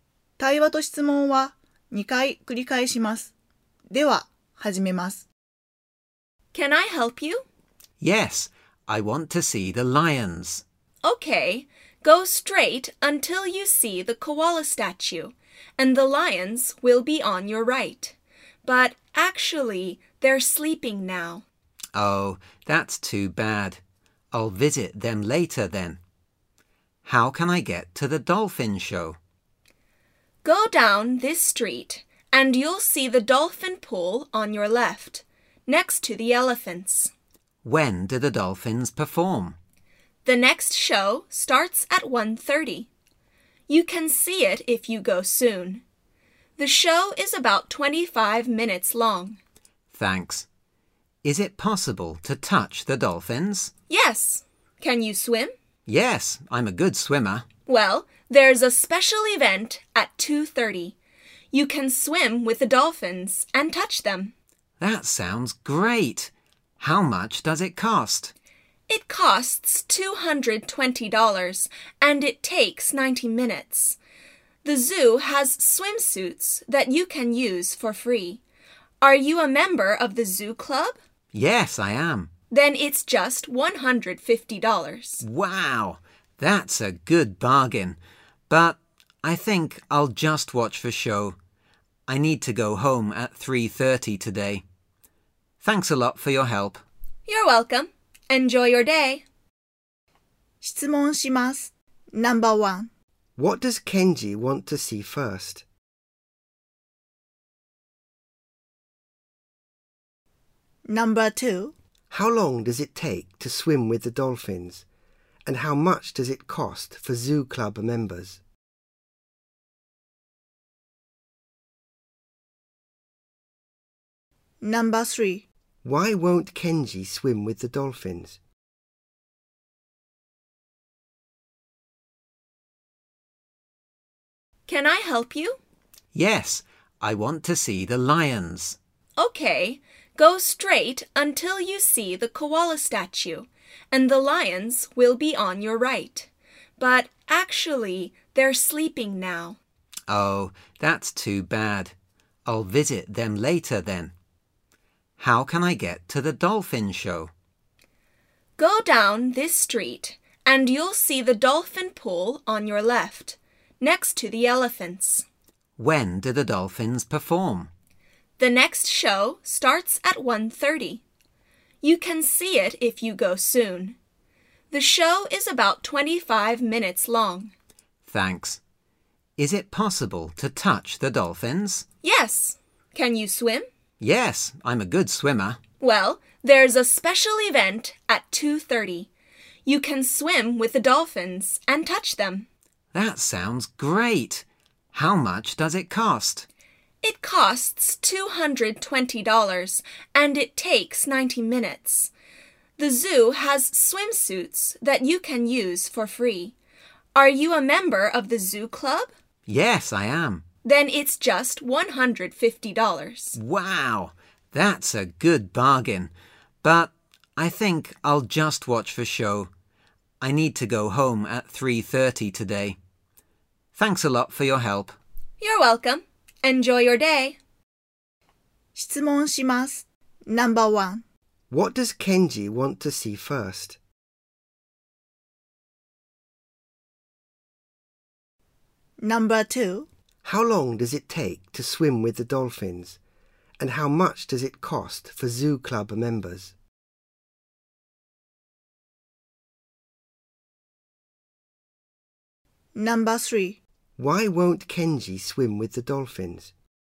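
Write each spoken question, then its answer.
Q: How long does it take to swim with the dolphins? And how much does it cost for zoo club members?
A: 90 minutes, $150

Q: Why won't Kenji swim with the dolphins?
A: He needs to go home at 3:30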